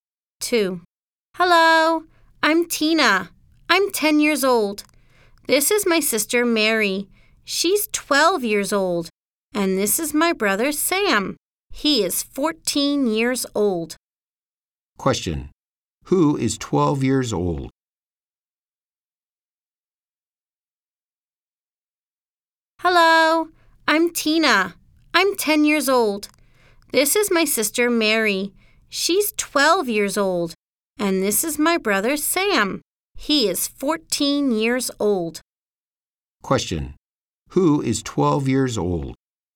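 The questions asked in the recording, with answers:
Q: Who is 12 years old?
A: Mary, Tina's sister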